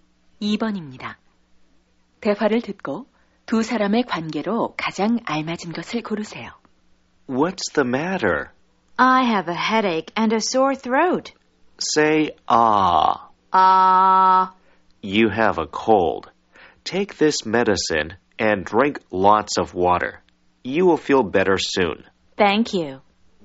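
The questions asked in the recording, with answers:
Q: 대화를 듣고 두 사람의 관계로 가장 알맞은 것을 고르세요.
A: 의사와 환자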